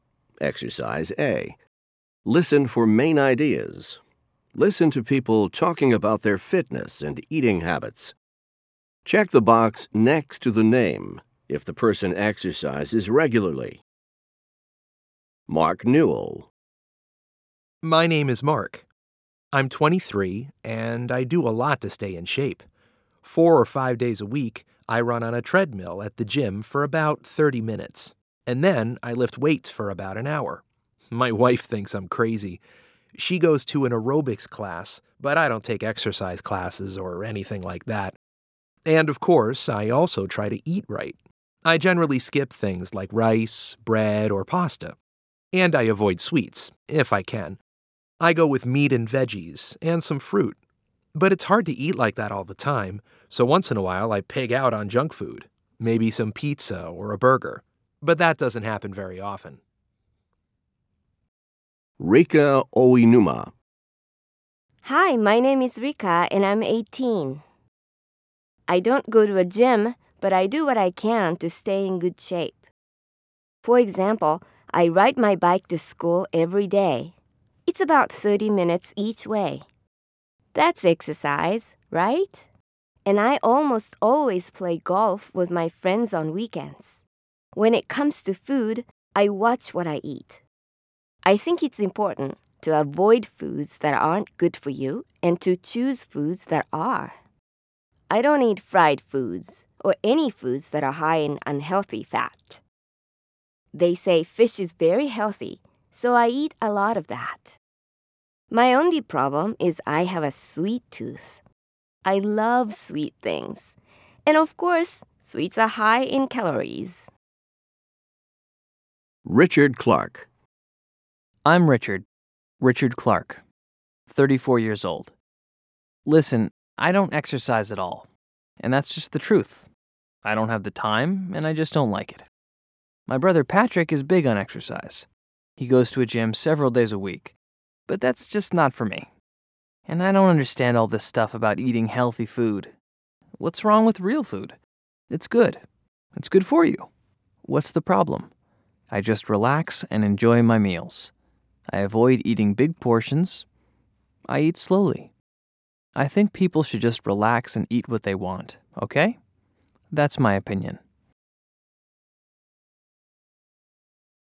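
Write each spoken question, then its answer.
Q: Check the box next to the name if the person exercises regularly. Mark Newell.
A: Yes, he exercises regularly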